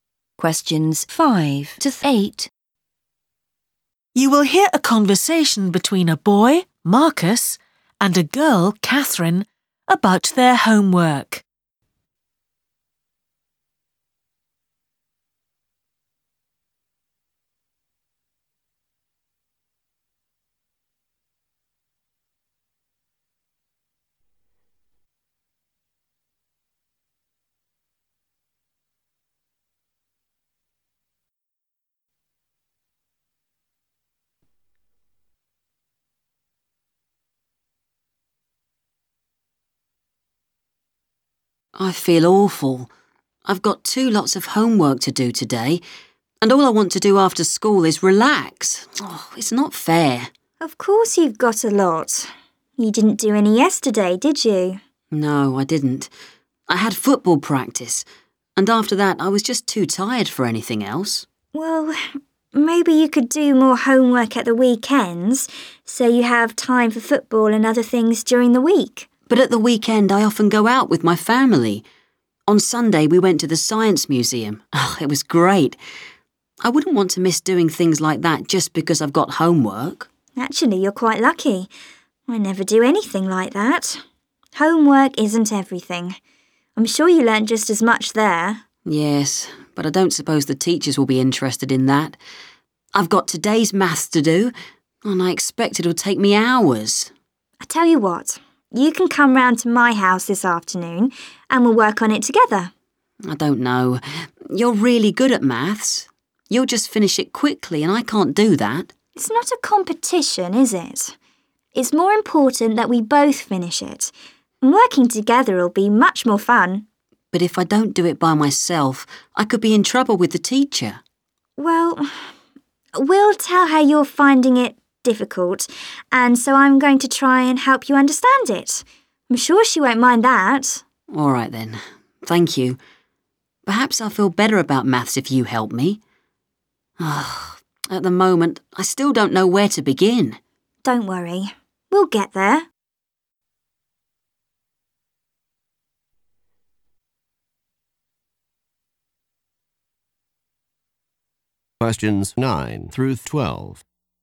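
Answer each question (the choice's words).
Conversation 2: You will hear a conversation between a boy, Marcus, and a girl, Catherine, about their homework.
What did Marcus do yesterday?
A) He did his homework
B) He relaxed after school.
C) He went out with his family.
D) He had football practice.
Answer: He had football practice.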